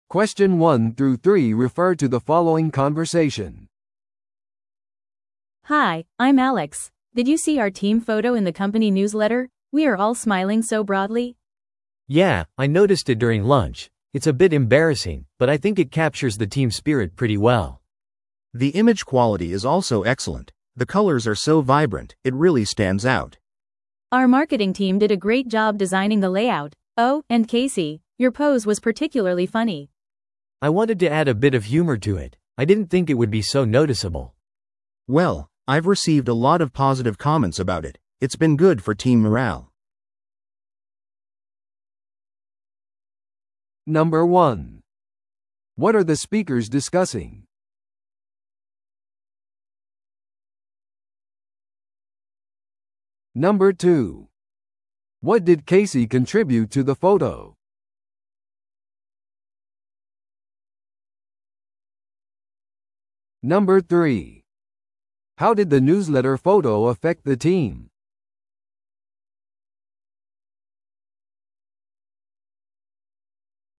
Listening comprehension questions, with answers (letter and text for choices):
Listen to the audio below and answer the questions.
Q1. What are the speakers discussing?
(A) マーケティングキャンペーンのレイアウト。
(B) チーム写真の問題。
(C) 会社のニュースレターに掲載された写真。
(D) 職場での画像品質の向上。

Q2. What did Casey contribute to the photo?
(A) 彼女が写真を撮りました。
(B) 彼女のユーモラスなポーズ。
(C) 彼女がレイアウトを編集しました。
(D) 彼女が色を選びました。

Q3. How did the newsletter photo affect the team?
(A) チームメンバーの中には恥ずかしがる人もいました。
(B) 作業量が大幅に増加しました。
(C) 同僚たちの間で議論を引き起こしました。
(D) チームの士気を高めました。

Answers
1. (C) 会社のニュースレターに掲載された写真。
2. (B) 彼女のユーモラスなポーズ。
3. (D) チームの士気を高めました。

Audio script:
A: Hi, I'm Alex. Did you see our team photo in the company newsletter? We are all smiling so broadly!
B: Yeah, I noticed it during lunch. It's a bit embarrassing, but I think it captures the team spirit pretty well.
C: The image quality is also excellent. The colors are so vibrant, it really stands out.
A: Our marketing team did a great job designing the layout. Oh, and Casey, your pose was particularly funny.
B: I wanted to add a bit of humor to it. I didn't think it would be so noticeable!
C: Well, I've received a lot of positive comments about it. It's been good for team morale.